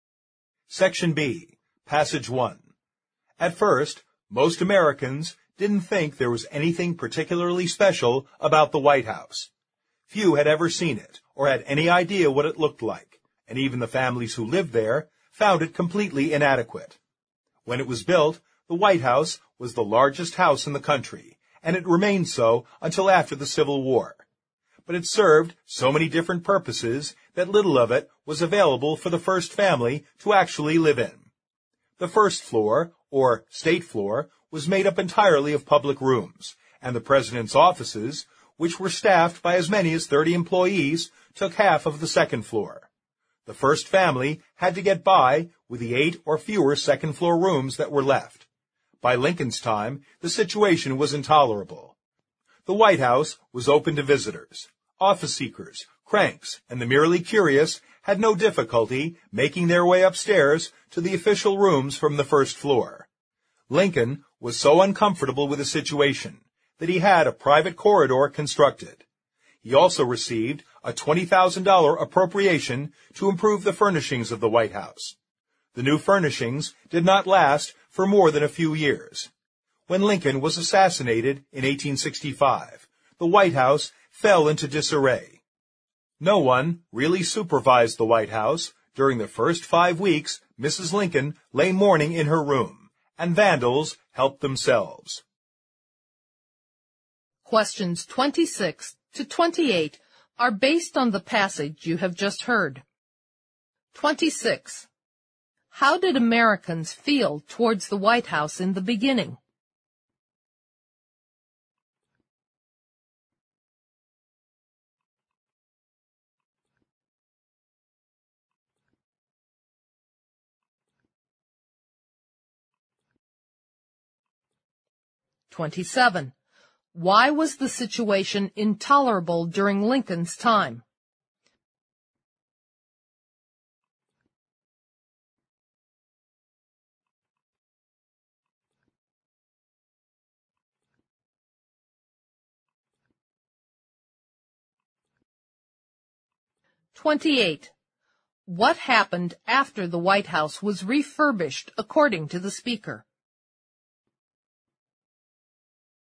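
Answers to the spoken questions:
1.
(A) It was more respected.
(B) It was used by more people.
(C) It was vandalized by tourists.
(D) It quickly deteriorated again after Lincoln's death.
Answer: (D) It quickly deteriorated again after Lincoln's death.
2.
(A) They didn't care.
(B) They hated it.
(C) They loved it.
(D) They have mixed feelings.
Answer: (A) They didn't care.
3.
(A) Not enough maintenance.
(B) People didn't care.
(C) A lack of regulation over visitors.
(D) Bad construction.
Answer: (C) A lack of regulation over visitors.

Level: 六级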